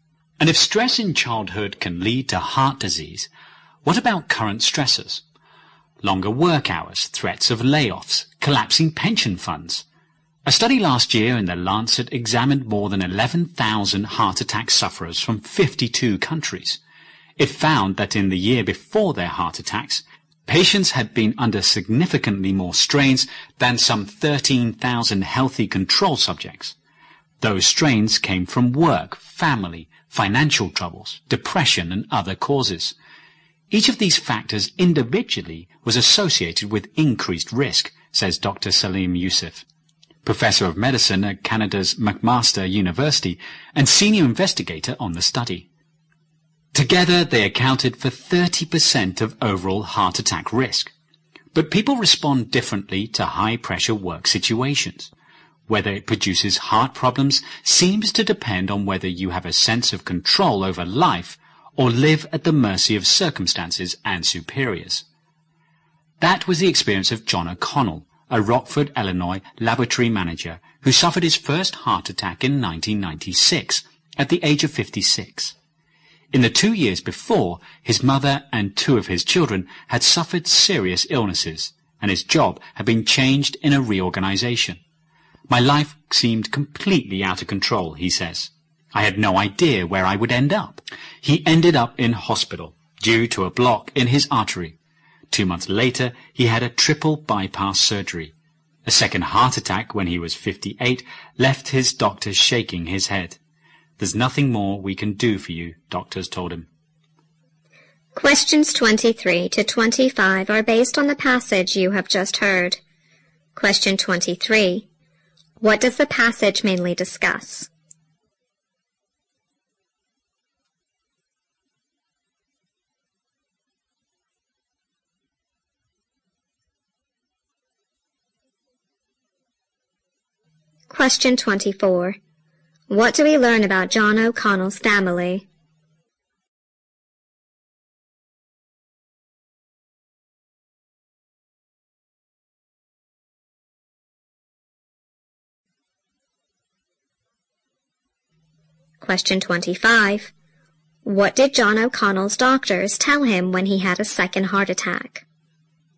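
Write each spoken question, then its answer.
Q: What does the passage mainly discuss?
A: The relationship between stress and heart disease

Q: What do we learn about John O'Connell's family?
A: His mother and two of his children had suffered serious illnesses

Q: What did John O'Connell's doctors tell him when he had a second heart attack?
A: There was nothing more they could do for him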